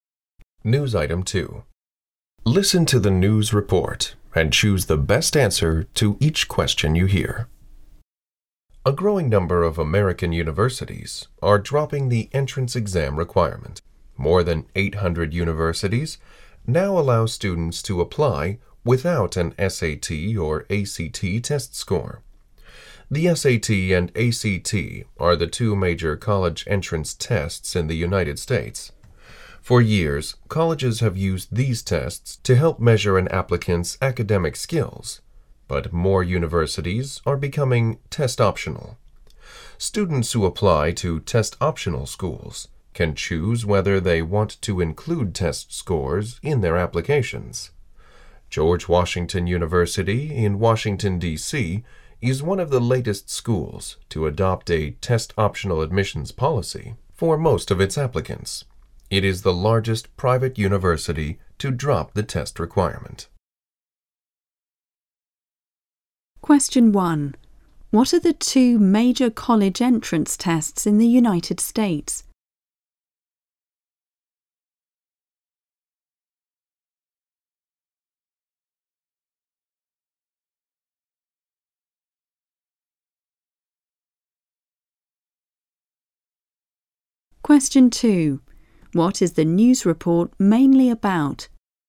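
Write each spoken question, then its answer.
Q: What are the two major college entrance tests in the United States?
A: The SAT and ACT

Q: What is the news report mainly about?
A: More American universities are dropping the entrance exam requirement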